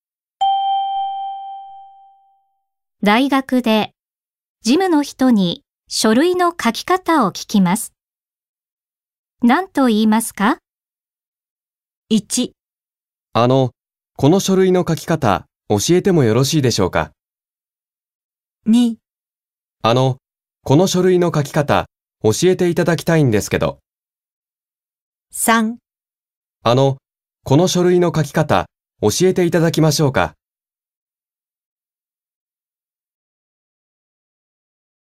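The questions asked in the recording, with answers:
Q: 大学で事務の人に書類の書き方を聞きます。何と言いますか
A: 2: この書類の書き方、教えていただきたいんですけど。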